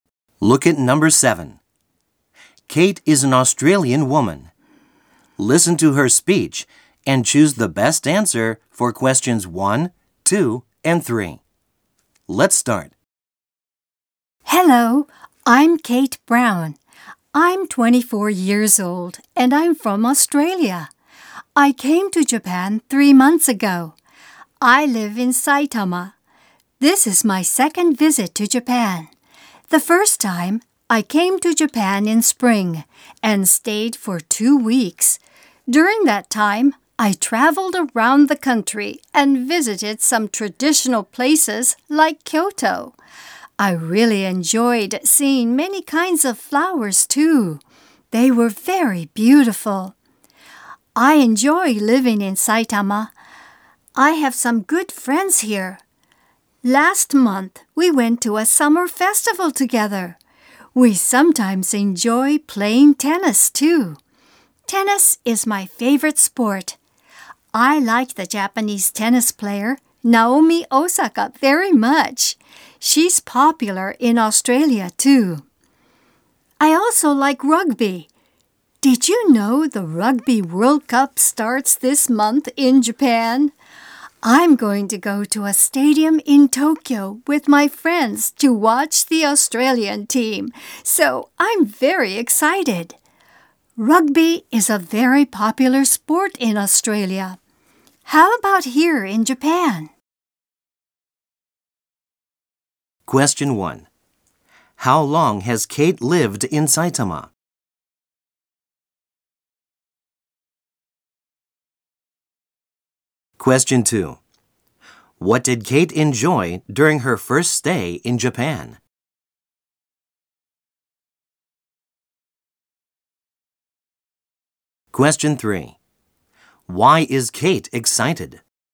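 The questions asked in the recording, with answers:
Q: How long has Kate lived in Saitama?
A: For three months

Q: Why is Kate excited?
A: She is going to watch the Australian team at the Rugby World Cup in Tokyo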